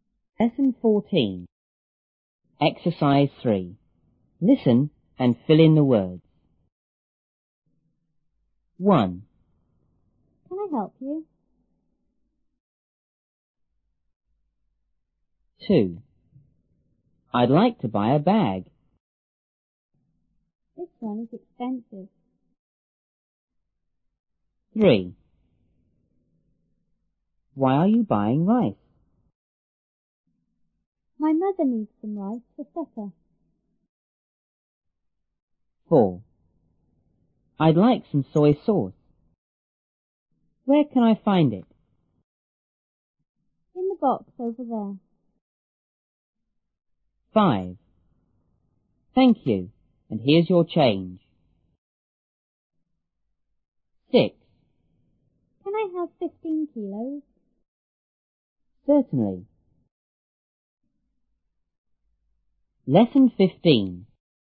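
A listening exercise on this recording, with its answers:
3.Listen and fill in the words.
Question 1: ___ I ___ you?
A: Can, help

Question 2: A:I'd like to buy a bag.B:This one is ___.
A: expensive

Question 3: A:Why are you ___ ___ ?My mother needs some ___ for supper.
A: buying rice, rice

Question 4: A:___ like some soy sauce.Where ___ I find it?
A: I'd, can

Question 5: Thank you and ___ your ___.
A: here's, change

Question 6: A:Can I have 15 ___ ? B:___.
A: kilos, Certainly

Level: 初中英语广州版1B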